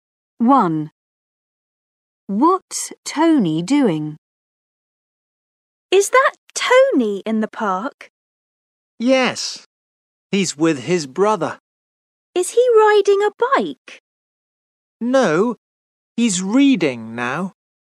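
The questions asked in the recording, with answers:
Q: What's Tony doing?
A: He's reading.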